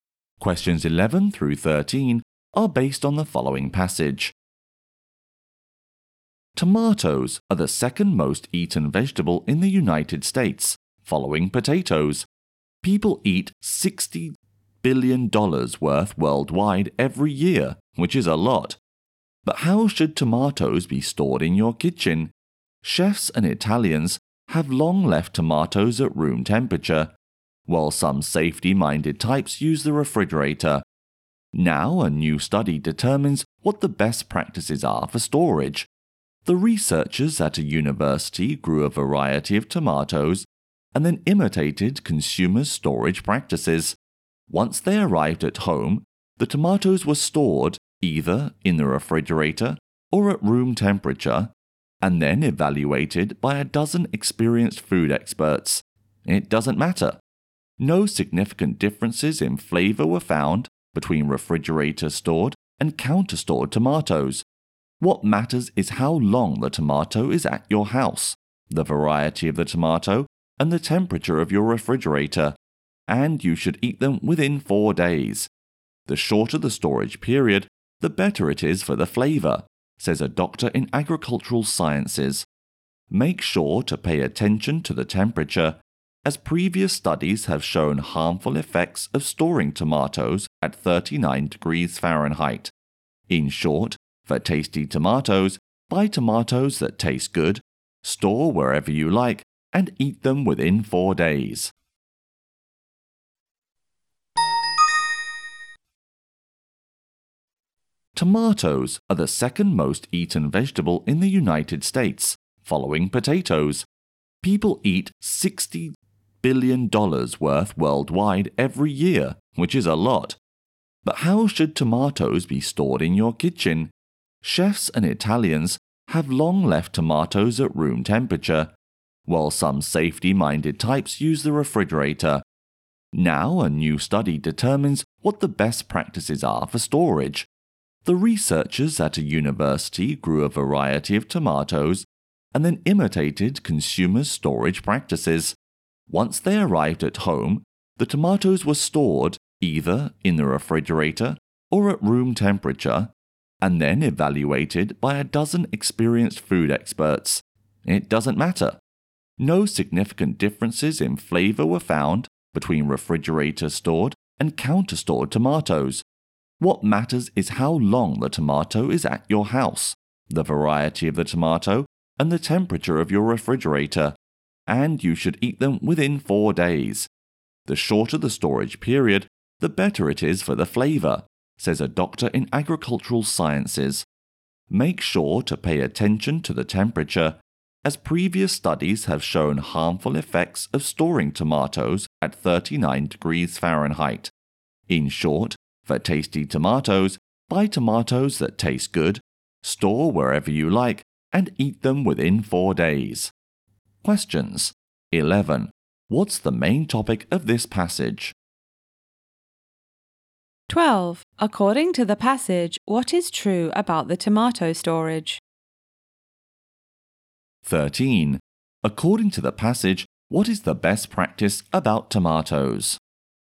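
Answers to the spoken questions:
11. How to store tomatoes
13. Buy tasty tomatoes, store them anywhere, and eat them within 4 days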